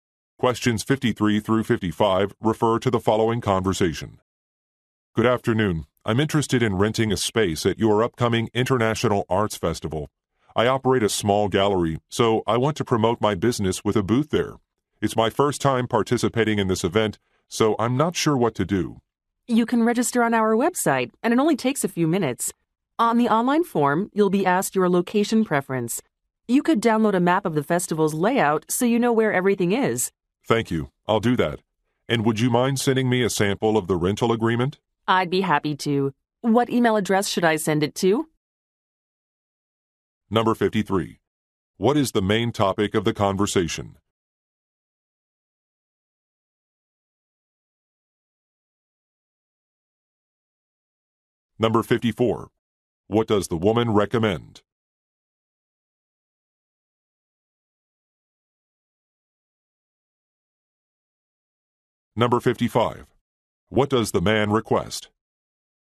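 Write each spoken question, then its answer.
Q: What is the main topic of the conversation?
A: Renting a booth at an arts festival

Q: What does the man request?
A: A sample rental agreement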